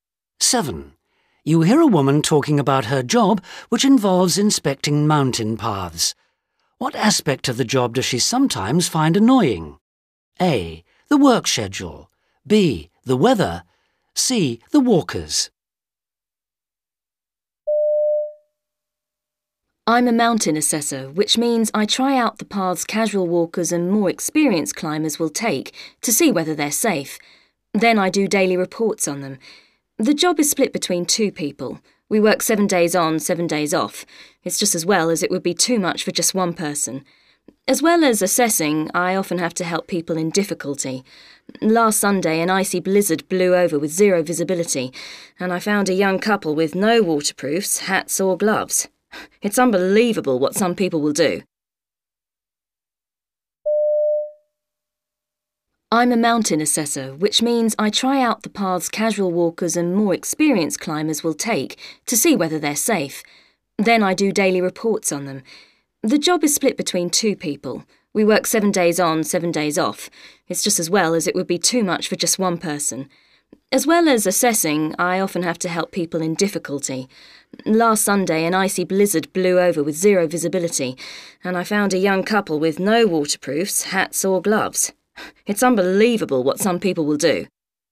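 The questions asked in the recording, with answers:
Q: What aspect of the job does she sometimes find annoying?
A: C: The walkers.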